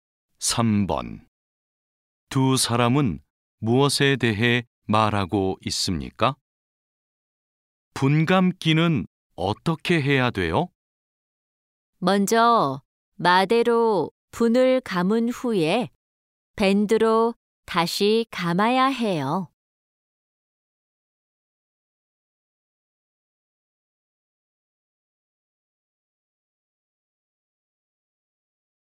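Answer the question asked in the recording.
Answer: 분감기 방법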